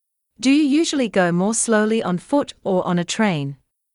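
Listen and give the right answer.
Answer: On foot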